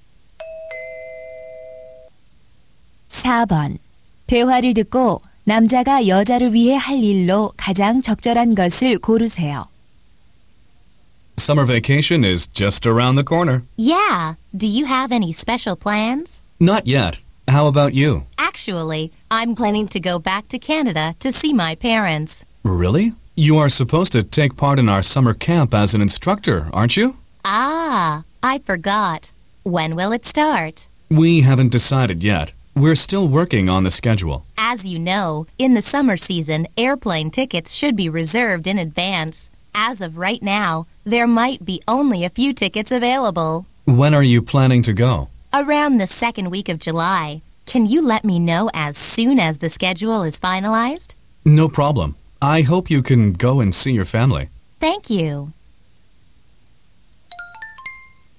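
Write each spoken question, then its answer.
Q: 대화를 듣고 남자가 여자를 위해 할 일로 가장 적절한 것을 고르세요.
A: 캠프 일정이 확정되면 바로 알려주기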